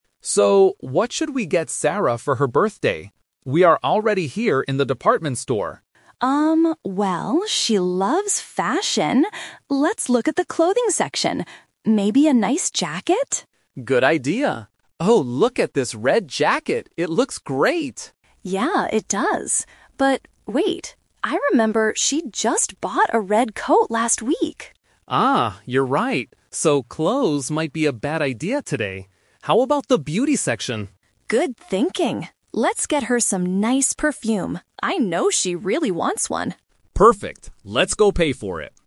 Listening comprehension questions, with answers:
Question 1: What do the friends finally decide to buy for Sarah?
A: Some perfume.

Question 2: Where are the two friends right now?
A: In a department store.

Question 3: Why didn't they buy the red jacket?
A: Because Sarah recently bought a red coat.

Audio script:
Man: So, what should we get Sarah for her birthday? We are already here in the department store.
Woman: Um, well, she loves fashion. Let's look at the clothing section. Maybe a nice jacket?
Man: Good idea. Oh, look at this red jacket. It looks great!
Woman: Yeah, it does. But... wait. I remember she just bought a red coat last week.
Man: Ah, you're right. So, clothes might be a bad idea today. How about the beauty section?
Woman: Good thinking! Let's get her some nice perfume. I know she really wants one.